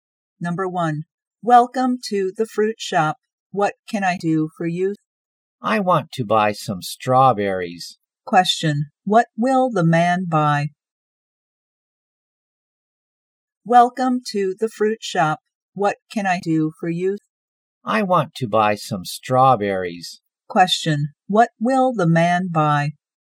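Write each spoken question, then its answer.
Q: Question, what will the man buy?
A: Strawberries.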